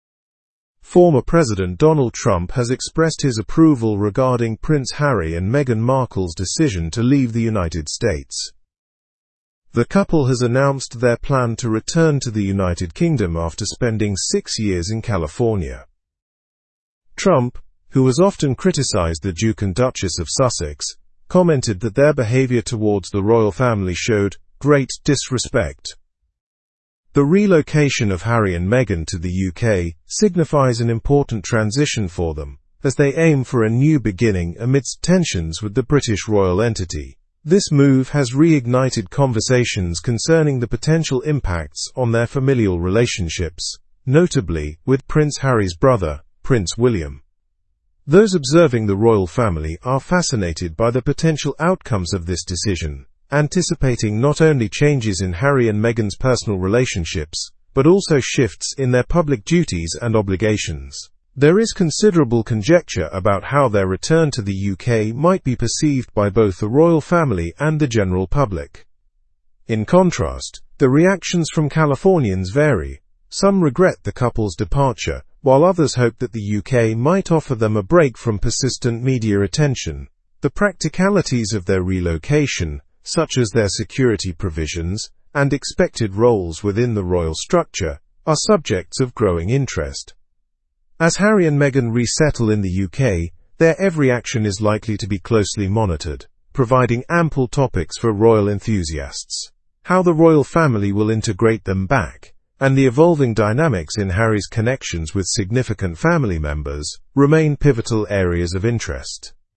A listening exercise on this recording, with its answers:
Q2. How long did the couple reside in California?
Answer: They resided in California for six years.

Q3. How did Donald Trump describe Harry and Meghan's treatment of the Royal Family?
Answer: He described it as "great disrespect."

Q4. What relationship is highlighted as potentially impacted by their move?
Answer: The relationship between Prince Harry and Prince William.

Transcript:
Former President Donald Trump has expressed his approval regarding Prince Harry and Meghan Markle's decision to leave the United States. The couple has announced their plan to return to the United Kingdom after spending six years in California. Trump, who has often criticized the Duke and Duchess of Sussex, commented that their behavior towards the Royal Family showed "great disrespect."
The relocation of Harry and Meghan to the UK signifies an important transition for them, as they aim for a new beginning amidst tensions with the British royal entity. This move has reignited conversations concerning the potential impacts on their familial relationships, notably with Prince Harry's brother, Prince William.
Those observing the royal family are fascinated by the potential outcomes of this decision, anticipating not only changes in Harry and Meghan's personal relationships but also shifts in their public duties and obligations. There is considerable conjecture about how their return to the UK might be perceived by both the Royal Family and the general public.
In contrast, the reactions from Californians vary; some regret the couple's departure while others hope that the UK might offer them a break from persistent media attention. The practicalities of their relocation, such as their security provisions and expected roles within the royal structure, are subjects of growing interest.
As Harry and Meghan resettle in the UK, their every action is likely to be closely monitored, providing ample topics for royal enthusiasts. How the Royal Family will integrate them back, and the evolving dynamics in Harry's connections with significant family members, remain pivotal areas of interest.

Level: Level 4